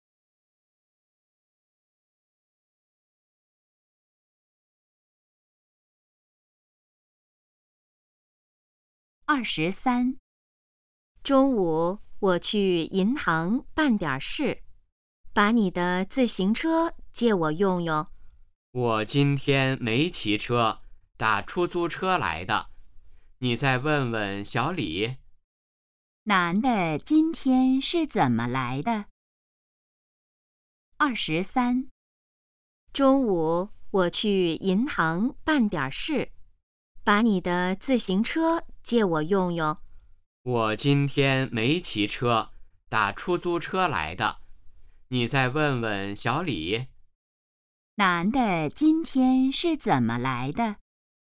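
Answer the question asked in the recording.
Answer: 打出租车来的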